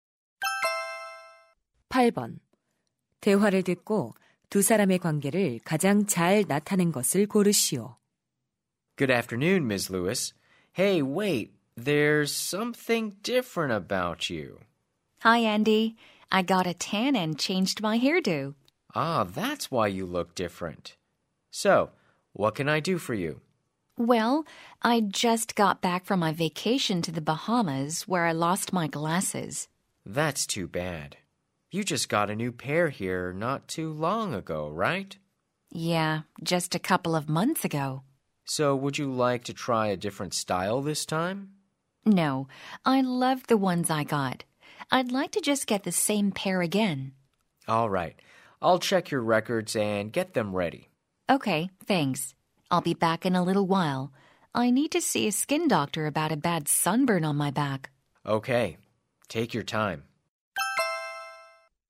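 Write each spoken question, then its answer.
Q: 대화를 듣고 두 사람의 관계를 가장 잘 나타낸 것을 고르시오.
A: 안경점 직원 - 손님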